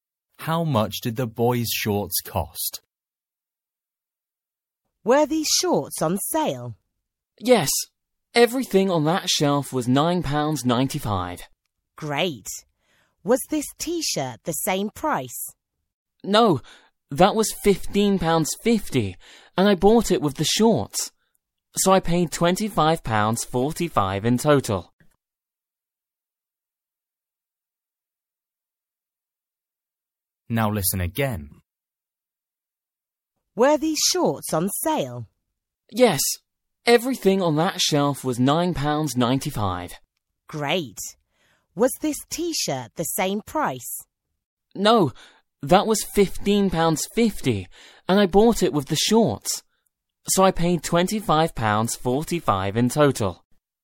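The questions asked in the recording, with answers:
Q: How much did the boys' shorts cost?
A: £9.95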